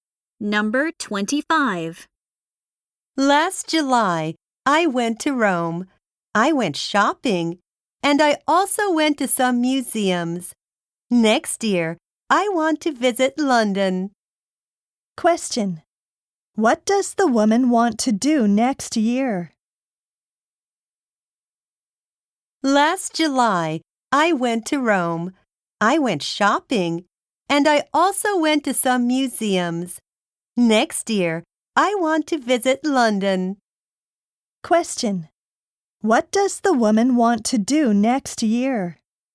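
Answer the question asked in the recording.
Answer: Visit London.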